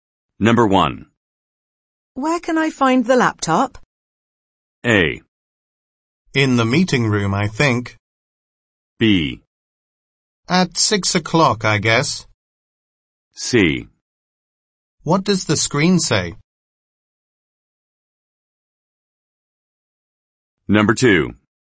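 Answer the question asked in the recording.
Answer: A: In the meeting room, I think.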